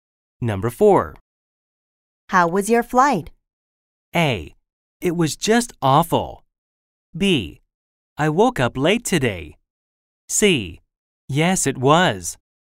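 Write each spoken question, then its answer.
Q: How was your flight?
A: A: It was just awful.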